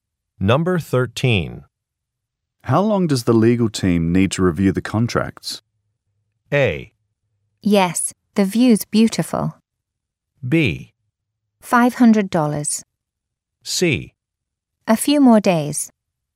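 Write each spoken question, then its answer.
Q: How long does the legal team need to review the contracts?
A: C: A few more days.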